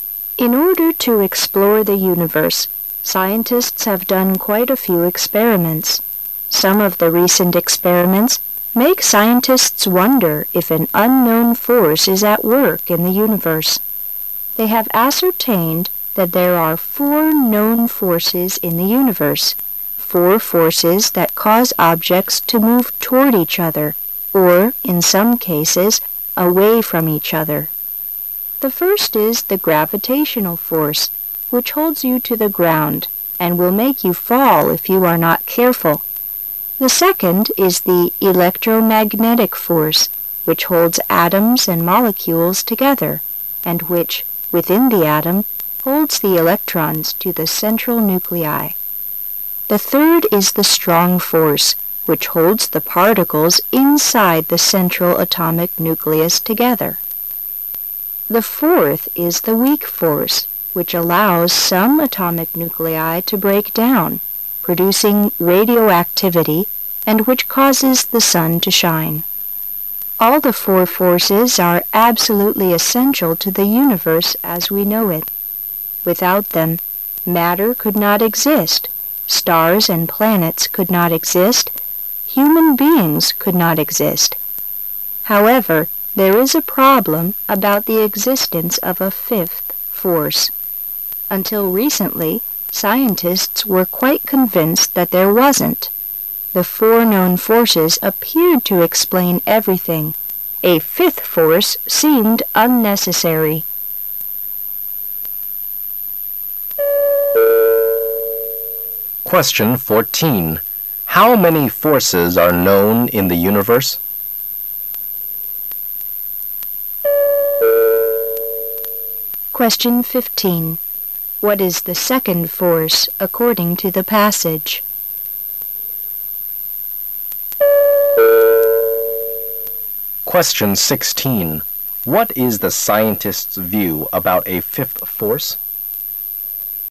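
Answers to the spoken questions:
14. Four
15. The electromagnetic force
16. Until recently they were convinced it didn't exist; it seemed unnecessary

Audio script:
[解析] 14-16 In order to explore the universe, scientists have done quite a few experiments. Some of the recent experiments make scientists wonder if an unknown force is at work in the universe. They have ascertained that there are four known forces in the universe, four forces that causes objects to move toward each other or, in some cases, away from each other. The first is the "gravitational force", which holds you to the ground and will make you fall if you are not careful. The second is the "electromagnetic force", which holds atoms and molecules together and which, within the atom, holds the electrons to the central nuclei. The third is the "strong force", which holds the particles inside the central atomic nucleus together. 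The fourth is the "weak force", which allows some atomic nuclei to break down, producing radioactivity, and which causes the sun to shine. All the four forces are absolutely essential to the universe as we know it. Without them, matter could not exist, stars and planets could not exist, human beings could not exist. However, there is a problem about the existence of a fifth force. Until recently, scientists were quite convinced that there wasn't. The four known forces appeared to explain everything; a fifth force seemed unnecessary.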